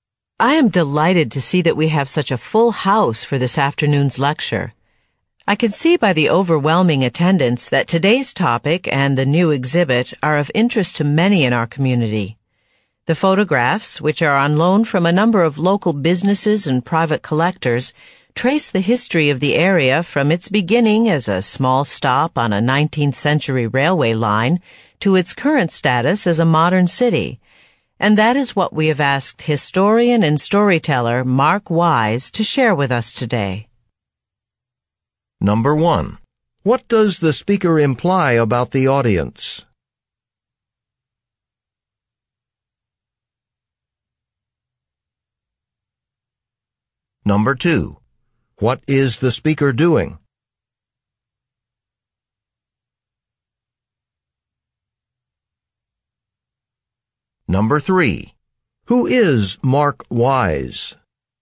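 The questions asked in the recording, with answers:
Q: What is the speaker doing?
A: Introducing a lecture and a speaker at a photo exhibit

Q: Who is Mark Wise?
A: A historian and storyteller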